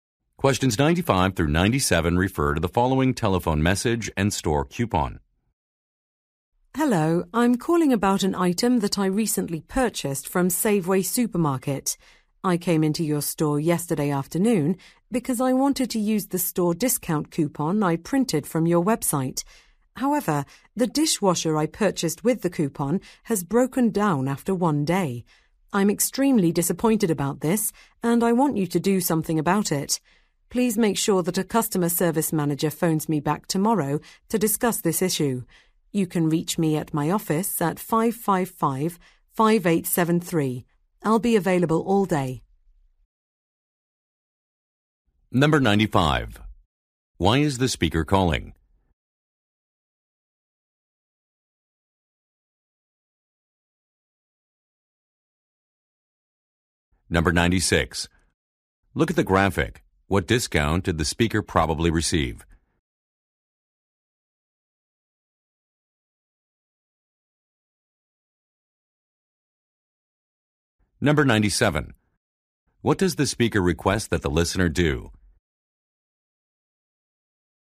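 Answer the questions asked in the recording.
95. To complain about a broken dishwasher
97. Have a customer service manager call her back tomorrow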